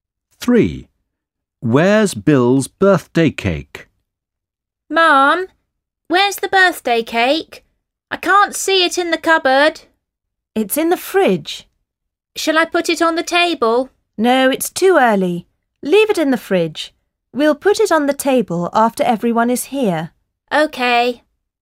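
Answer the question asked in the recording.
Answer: In the fridge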